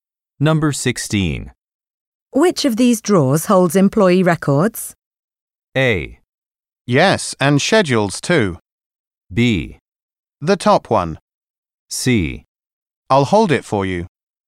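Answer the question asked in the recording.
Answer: B: The top one.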